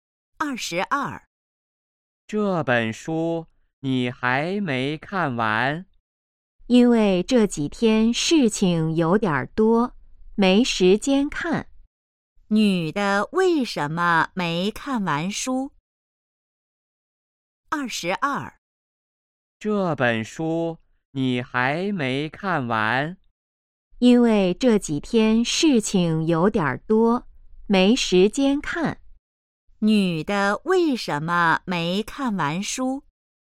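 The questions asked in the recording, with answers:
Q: 女的为什么没看完书?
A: 这几天事情多,没时间看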